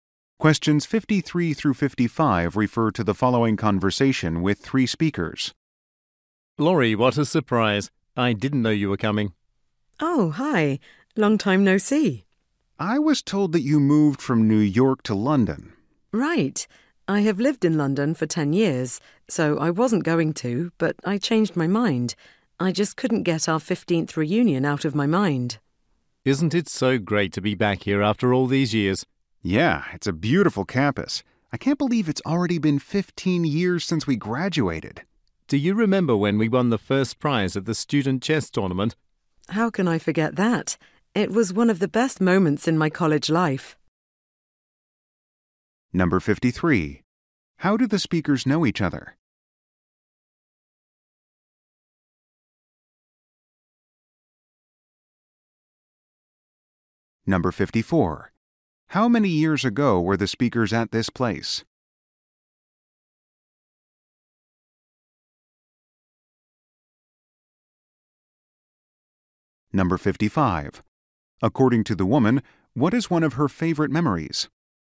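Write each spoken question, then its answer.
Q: How do the speakers know each other?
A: They went to college together

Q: How many years ago were the speakers at this place?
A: 15 years ago

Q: According to the woman, what is one of her favorite memories?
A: Winning first prize at the student chess tournament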